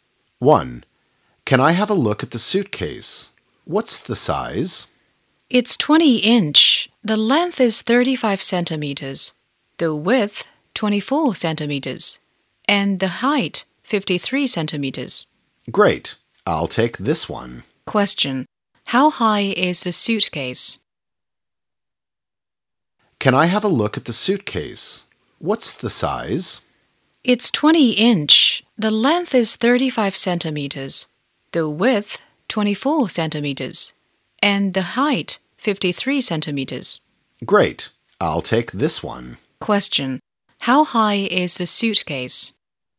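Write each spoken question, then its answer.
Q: How high is the suitcase?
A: 53 centimeters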